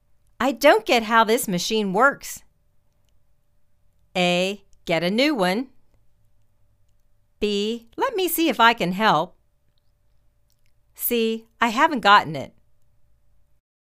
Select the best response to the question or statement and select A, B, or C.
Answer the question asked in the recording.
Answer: Let me see if I can help.